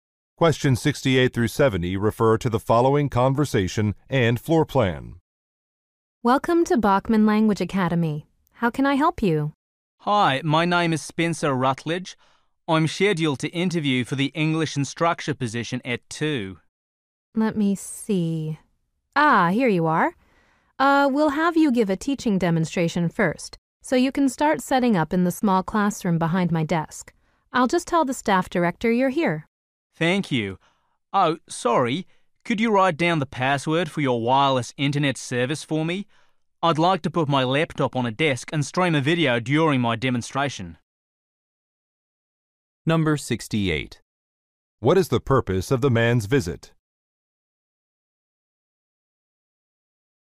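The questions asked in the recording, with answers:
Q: What is the purpose of the man's visit?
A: A job interview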